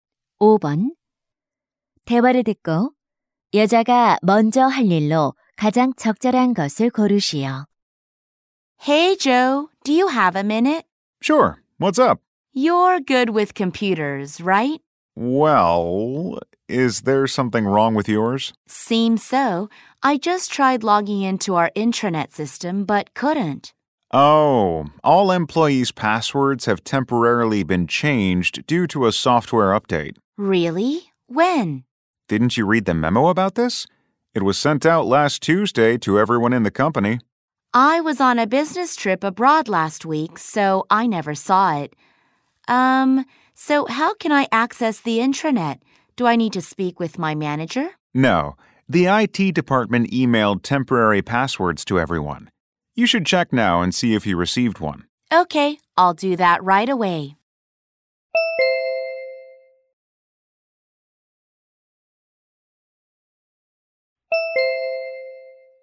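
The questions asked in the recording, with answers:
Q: 대화를 듣고 여자가 먼저 할 일로 가장 적절한 것을 고르시오.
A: 임시 비밀번호가 온 이메일 확인하기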